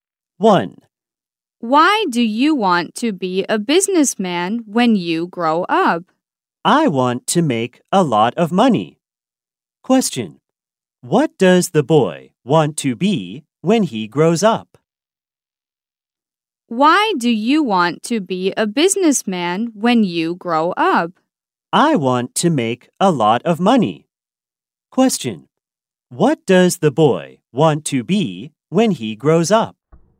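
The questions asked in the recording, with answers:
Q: What does the boy want to be when he grows up?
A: A businessman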